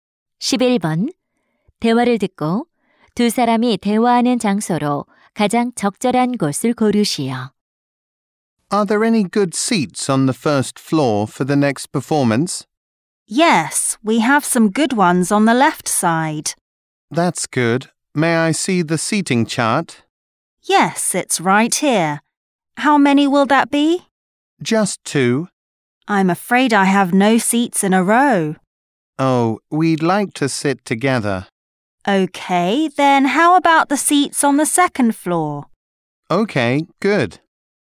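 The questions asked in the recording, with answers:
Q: 대화를 듣고 두 사람이 대화하는 장소로 가장 적절한 곳을 고르시오.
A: 공연장 매표소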